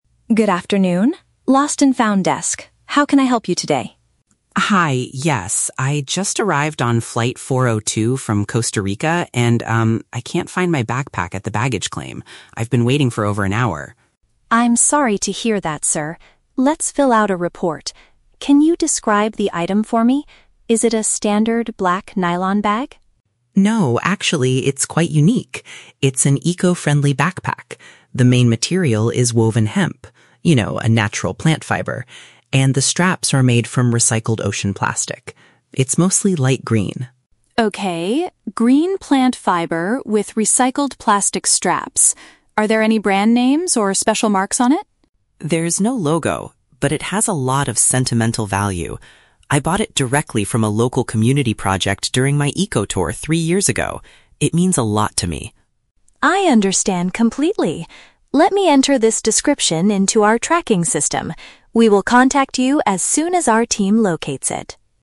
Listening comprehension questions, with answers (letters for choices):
Listen to a conversation between a passenger and an airport worker at the Lost and Found desk. Choose the correct answer (A, B, or C) for each question.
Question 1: What is the passenger's current problem?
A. His bag was stolen by another traveler on the plane.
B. His luggage did not appear on the carousel after his flight.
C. His backpack was badly damaged by the airport staff.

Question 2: What materials were used to make the missing bag?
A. Ordinary black nylon and strong metal.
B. Traditional leather and organic cotton.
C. Natural plant threads and repurposed plastic.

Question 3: Why is the backpack so important to the man?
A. Because it holds special memories from a past vacation.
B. Because he purchased it for a very expensive price.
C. Because it is a limited edition item from a famous brand.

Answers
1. B
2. C
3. A

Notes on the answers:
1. Leo states that he "can't find my backpack at the baggage claim" after waiting for over an hour. "Baggage claim" and not finding it is paraphrased as "luggage did not appear on the carousel." Why traps are wrong: Option A is a Trap. He cannot find it, but he never claims someone stole it. Option C is a Trap. Damage is a common luggage issue, but it is not mentioned in this conversation.
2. Leo describes the bag as being made of "hemp... a natural plant fiber" and "recycled ocean plastic." "Natural plant fiber" is paraphrased as "natural plant threads," and "recycled" is paraphrased as "repurposed."

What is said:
Sarah: Good afternoon. Lost and Found desk. How can I help you today?
Leo: Hi, yes. I just arrived on flight 402 from Costa Rica, and, um, I can't find my backpack at the baggage claim. I've been waiting for over an hour.
Sarah: I'm sorry to hear that, sir. Let's fill out a report. Can you describe the item for me? Is it a standard black nylon bag?
Leo: No, actually, it's quite unique. It's an eco-friendly backpack. The main material is woven hemp—you know, a natural plant fiber. And the straps are made from recycled ocean plastic. It's mostly light green.
Sarah: Okay, green plant fiber with recycled plastic straps. Are there any brand names or special marks on it?
Leo: There's no logo. But it has a lot of sentimental value. I bought it directly from a local community project during my eco-tour three years ago. It means a lot to me.
Sarah: I understand completely. Let me enter this description into our tracking system. We will contact you as soon as our team locates it.